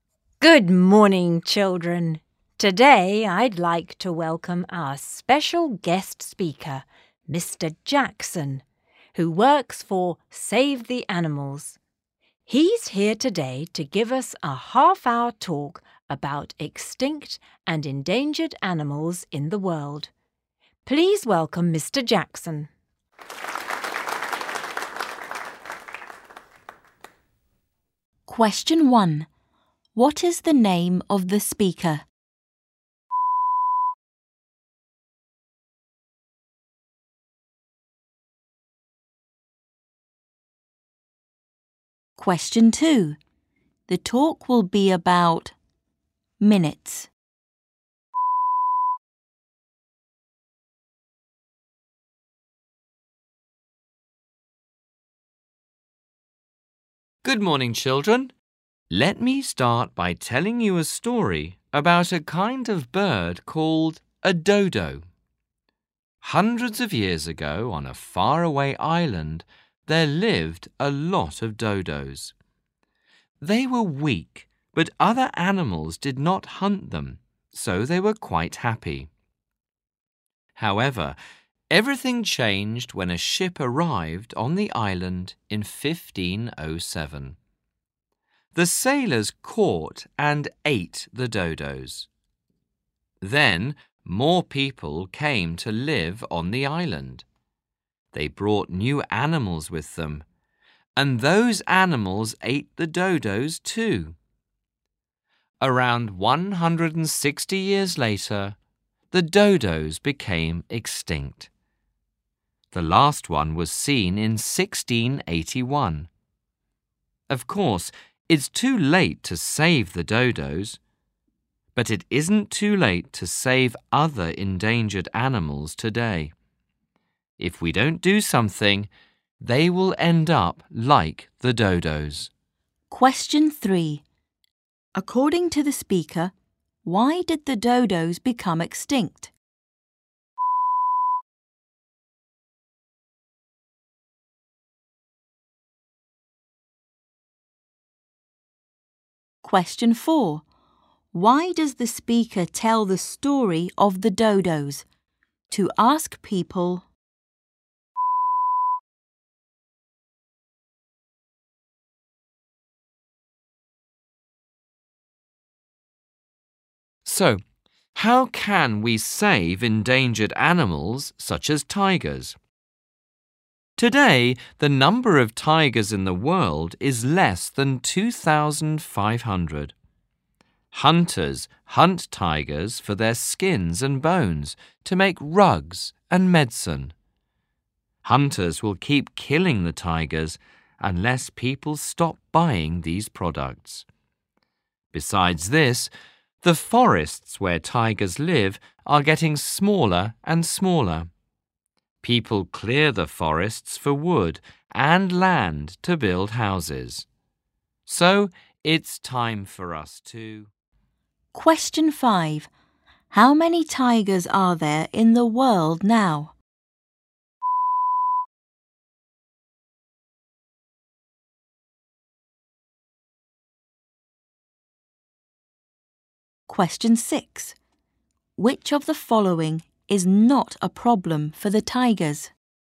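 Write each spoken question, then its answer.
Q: What is the name of the speaker?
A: Mr. Jackson

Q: The talk will be about minutes.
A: 30 (half an hour)

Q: According to the speaker, why did the dodos become extinct?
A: Sailors and the animals that people brought to the island ate them

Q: How many tigers are there in the world now?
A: Fewer than 2,500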